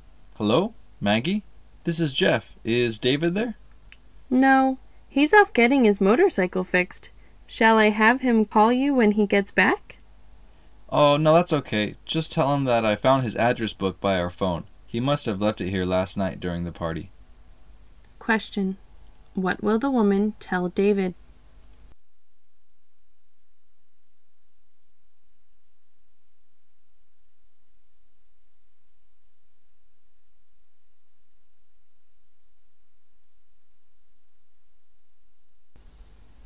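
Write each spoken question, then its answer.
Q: What will the woman tell David?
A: That Jeff found his address book by his phone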